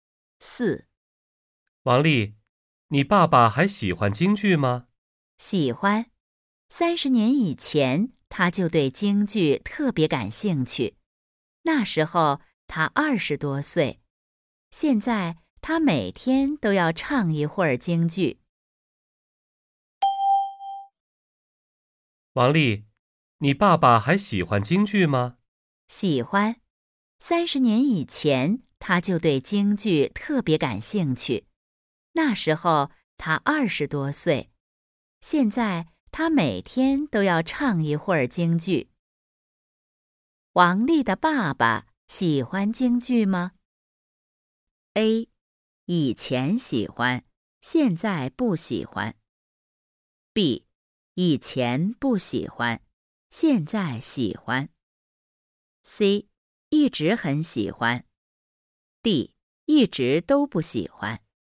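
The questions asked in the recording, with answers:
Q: 王丽的爸爸喜欢京剧吗?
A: C: 一直很喜欢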